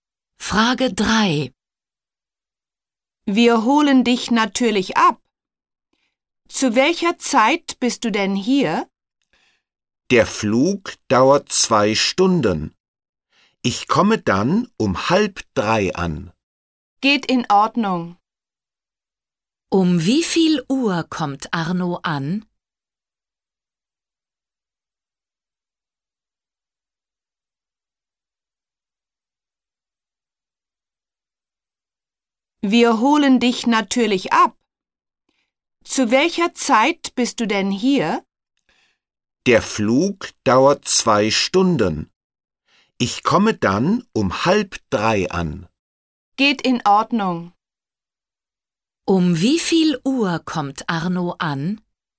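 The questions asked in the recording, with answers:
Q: Um wie viel Uhr kommt Arno an?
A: Um 2:30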